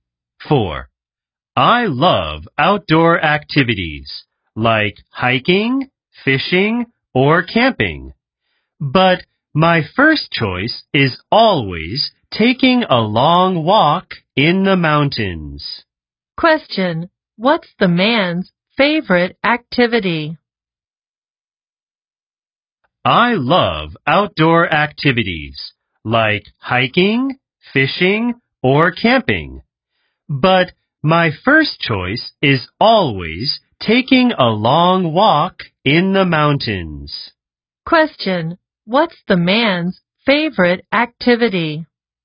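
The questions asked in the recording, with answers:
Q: Question, what's the man's favorite activity?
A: taking a long walk in the mountains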